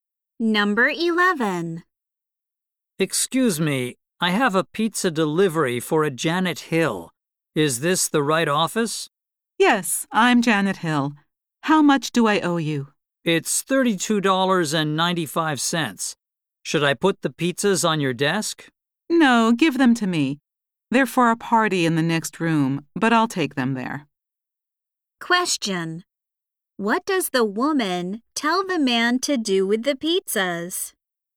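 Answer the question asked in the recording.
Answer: Give them to her.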